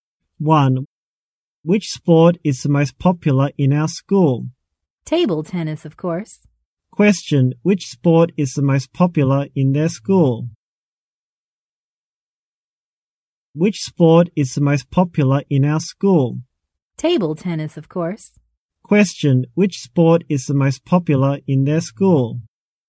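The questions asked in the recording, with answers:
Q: which sport is the most popular in their school?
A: Table tennis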